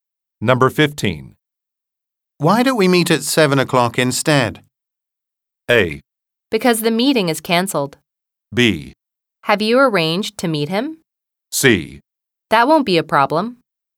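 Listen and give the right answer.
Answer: C: That won't be a problem.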